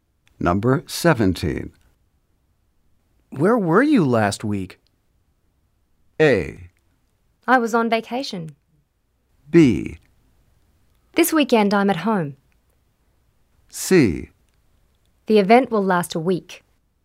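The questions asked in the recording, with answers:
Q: Where were you last week?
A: A: I was on vacation.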